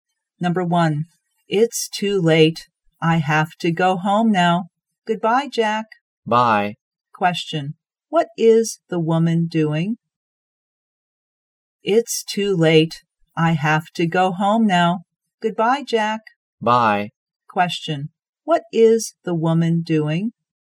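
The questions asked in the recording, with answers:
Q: what is the woman doing?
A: Saying goodbye / leaving to go home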